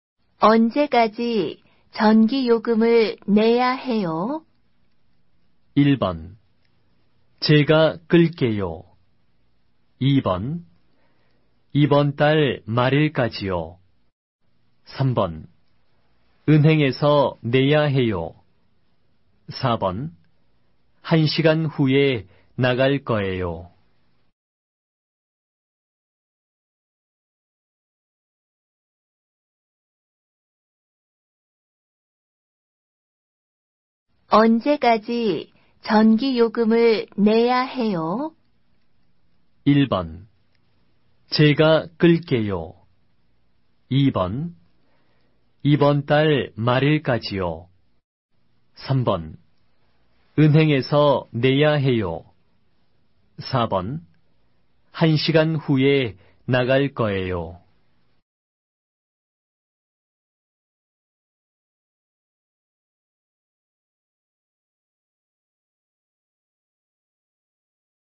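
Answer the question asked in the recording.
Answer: 2: 이번 달 말일까지요.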